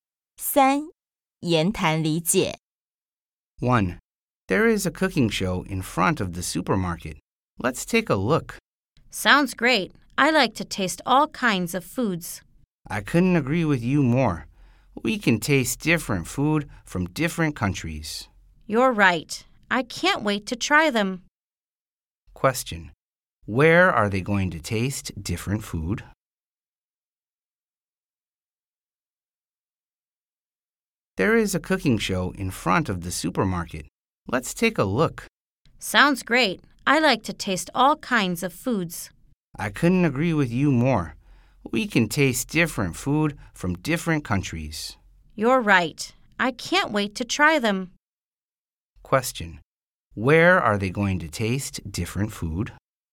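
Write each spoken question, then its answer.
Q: Where are they going to taste different food?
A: At the cooking show in front of the supermarket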